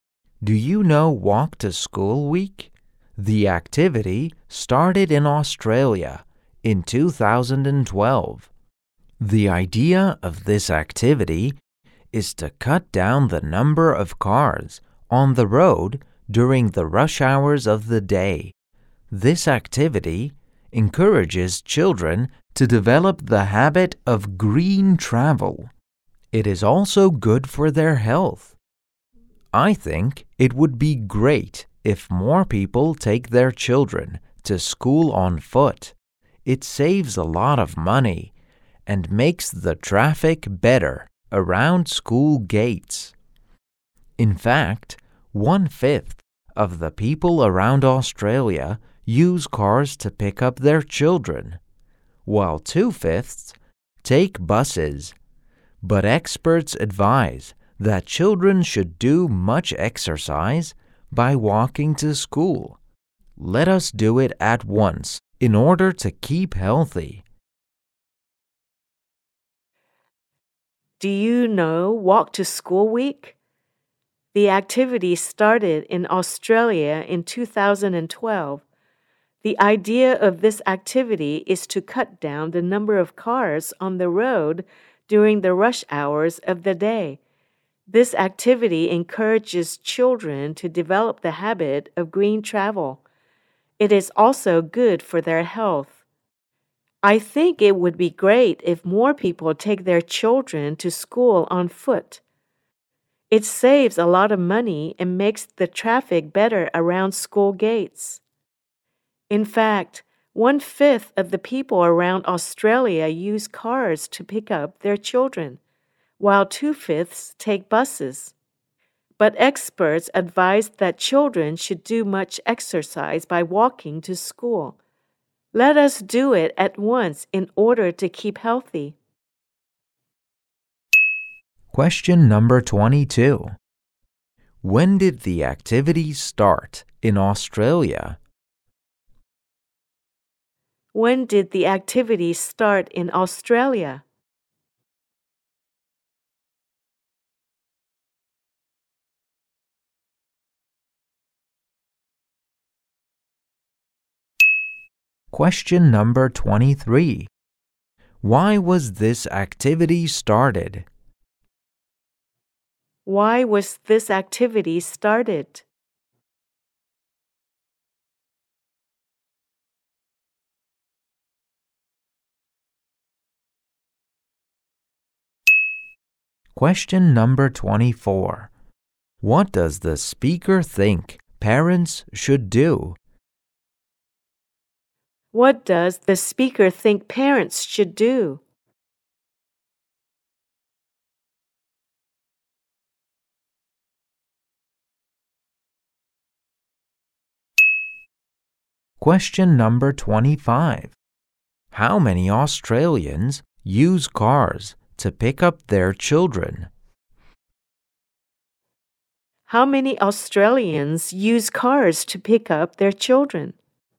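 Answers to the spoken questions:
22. In 2012
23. To cut down the number of cars on the road during rush hours
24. Take their children to school on foot
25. One fifth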